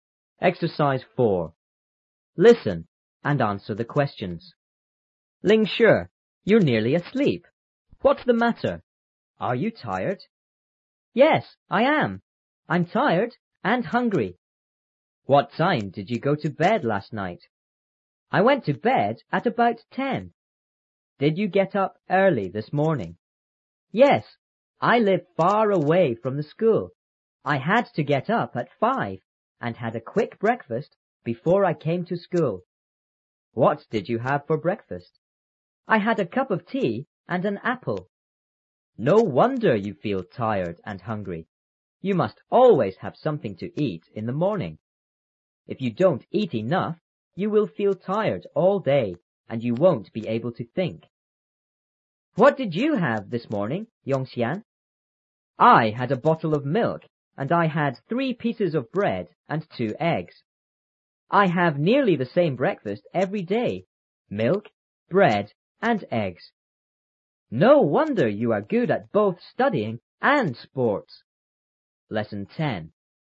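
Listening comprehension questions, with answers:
Listen and answer the questions.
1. How did Lingshi feel?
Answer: Tired and hungry.

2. What time did Lingshi go to bed last night?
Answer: At about 10.

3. Lingshi got up early this morning,didn't he?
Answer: Yes, he did. He got up at 5.

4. What did Lingshi have for breakfast this morning?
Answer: A cup of tea and an apple.

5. What did Yongxian have for breakfast?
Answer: A bottle of milk, 3 pieces of bread and 2 eggs.

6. What is Yongxian good at?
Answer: Both studying and sports.

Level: 初中英语广州版3B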